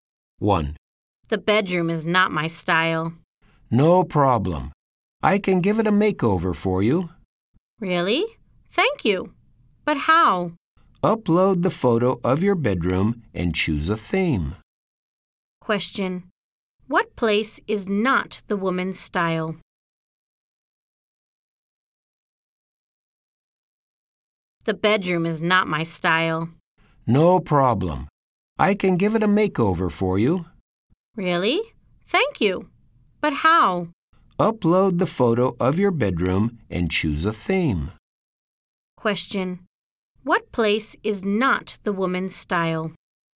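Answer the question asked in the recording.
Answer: The bedroom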